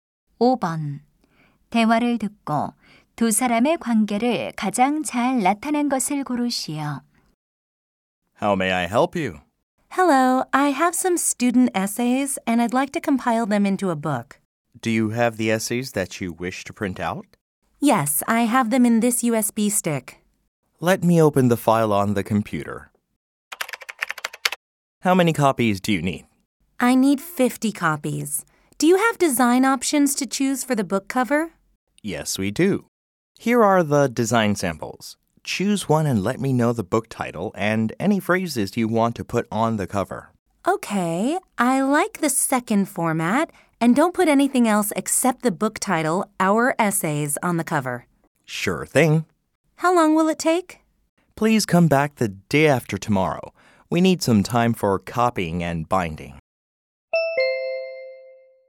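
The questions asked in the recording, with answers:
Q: 대화를 듣고 두 사람의 관계를 가장 잘 나타낸 것을 고르시오.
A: 인쇄소 직원 - 손님(교사)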